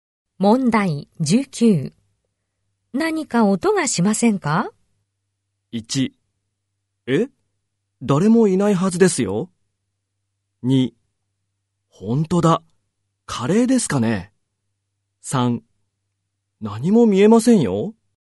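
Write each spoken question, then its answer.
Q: 何か音がしませんか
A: 1: え?誰もいないはずですよ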